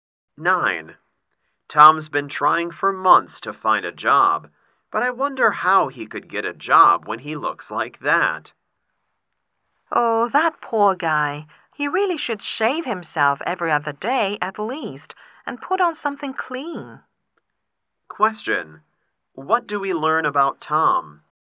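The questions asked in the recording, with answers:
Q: What do we learn about Tom?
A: He doesn't take care of his appearance.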